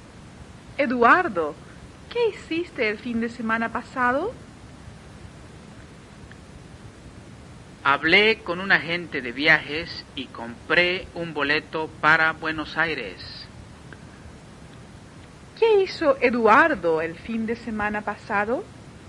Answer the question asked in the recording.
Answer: Eduardo habló con un agente de viajes y compró un boleto para Buenos Aires.